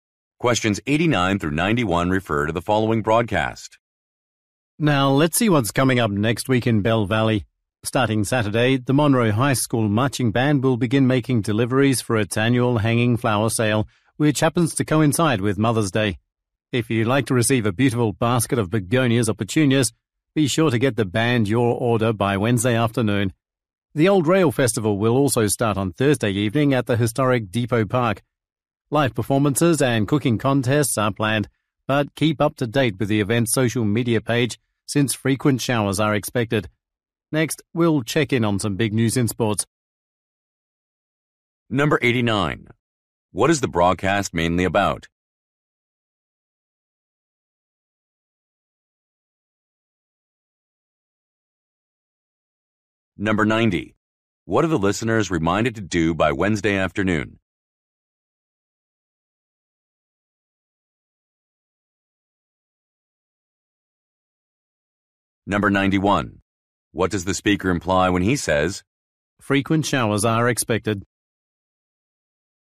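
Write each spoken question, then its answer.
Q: What is the broadcast mainly about?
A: Local events next week

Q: What are the listeners reminded to do by Wednesday afternoon?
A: Place orders for hanging flowers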